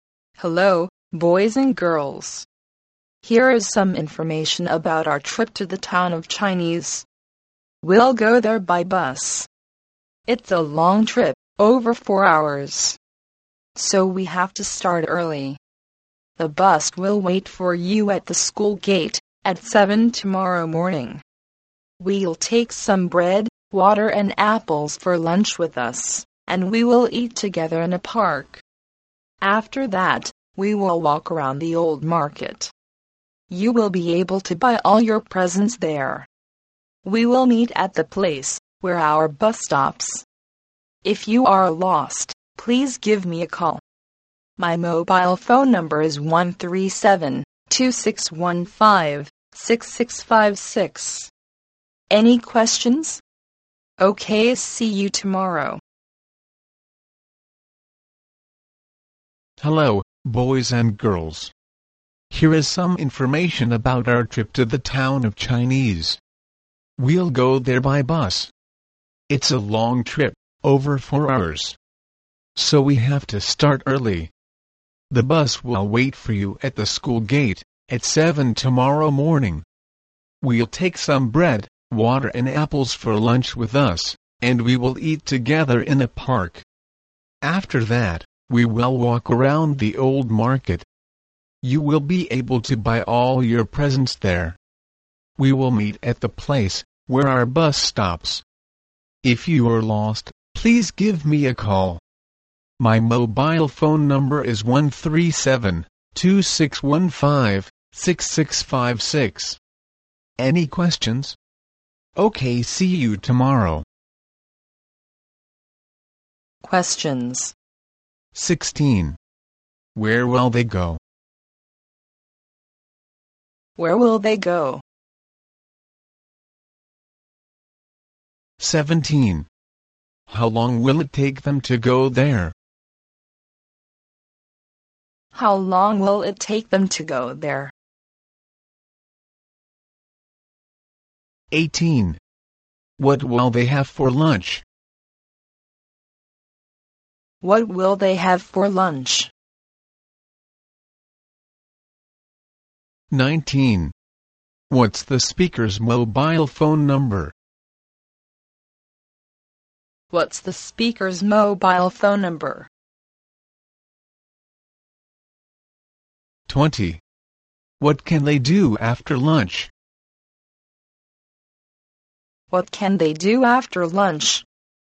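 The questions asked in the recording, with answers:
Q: How long will it take them to go there?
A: Over 4 hours

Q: What will they have for lunch?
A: Bread, water and apples

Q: What's the speaker's mobile phone number?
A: 137-2615-6656

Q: What can they do after lunch?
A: Walk around the old market and buy presents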